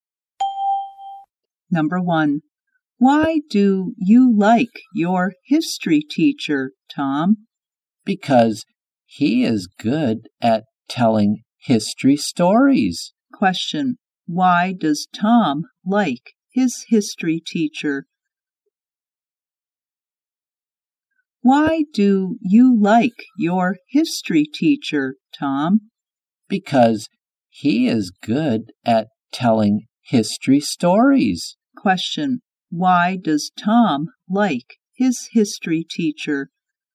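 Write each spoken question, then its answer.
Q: Why does Tom like his history teacher?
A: Because he is good at telling history stories.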